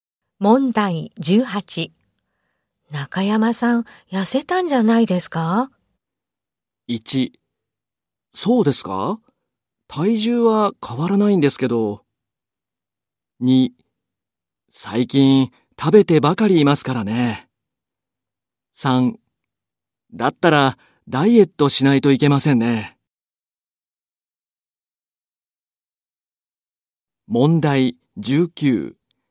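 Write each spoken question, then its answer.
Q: 中山さん、痩せたんじゃないですか?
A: 1: そうですか?体重は変わらないんですけど。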